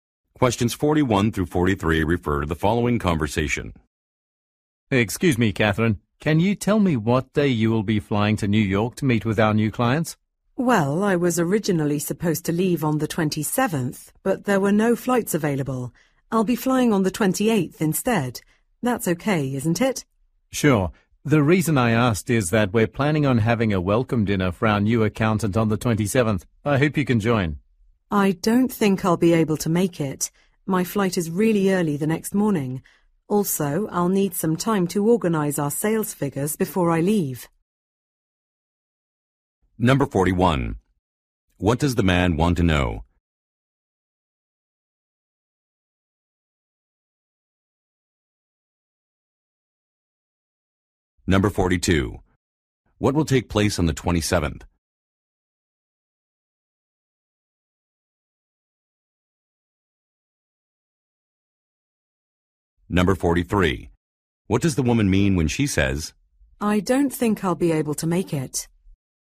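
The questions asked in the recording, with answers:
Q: What does the man want to know?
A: What day the woman will fly to New York

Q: What will take place on the 27th?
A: A welcome dinner for the new accountant

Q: What does the woman mean when she says,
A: She cannot attend the dinner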